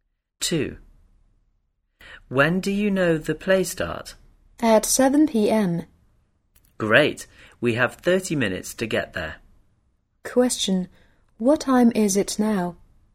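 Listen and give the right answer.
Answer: 6:30 p.m.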